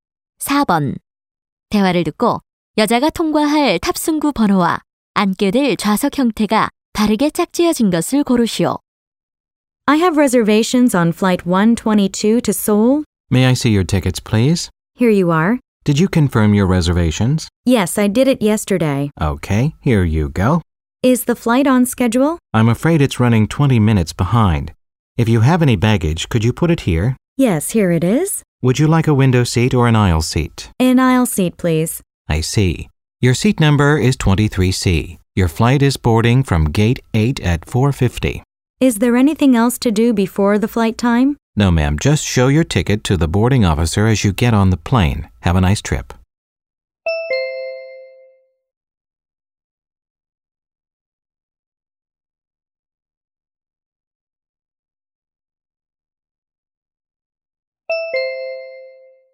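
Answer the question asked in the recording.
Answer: 8번 탑승구, 통로 좌석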